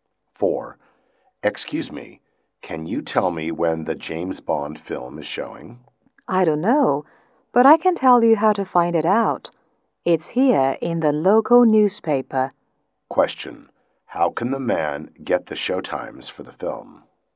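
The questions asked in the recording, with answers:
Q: How can the man get the showtimes for the film?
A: From the local newspaper.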